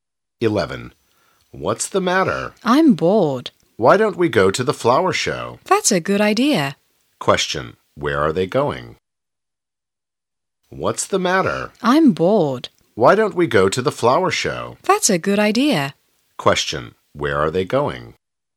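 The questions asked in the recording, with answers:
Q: where are they going?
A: To the flower show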